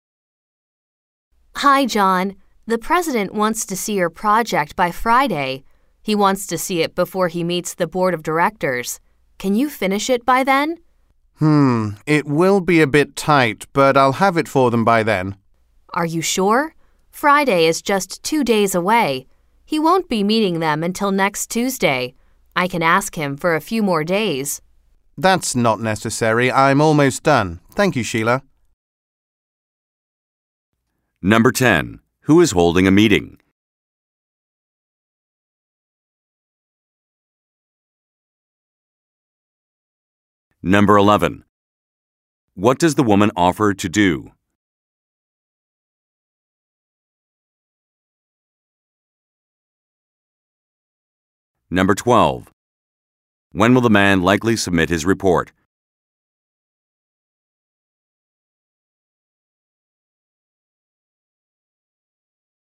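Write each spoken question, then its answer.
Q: Who is holding a meeting?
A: The president (with the board of directors)

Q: What does the woman offer to do?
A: Ask the president for a few more days

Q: When will the man likely submit his report?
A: By Friday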